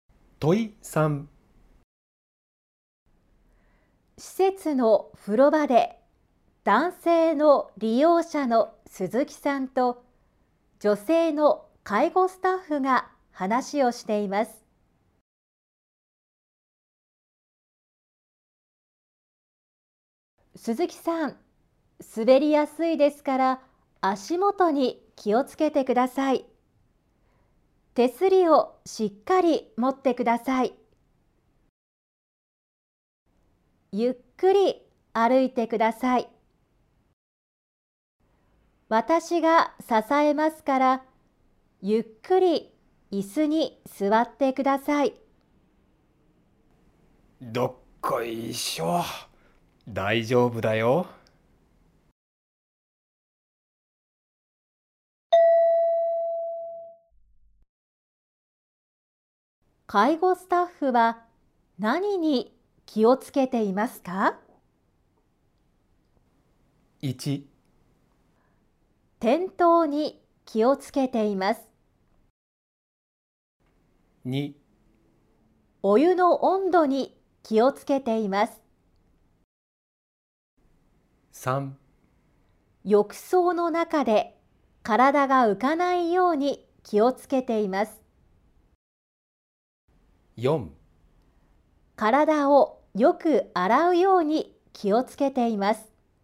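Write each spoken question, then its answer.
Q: 介護スタッフは何に気をつけていますか?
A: 1: 転倒に気をつけています。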